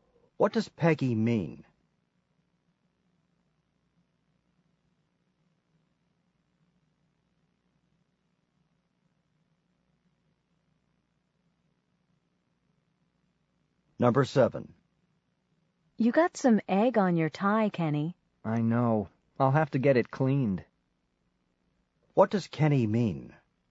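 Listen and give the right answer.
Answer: He will have his tie cleaned.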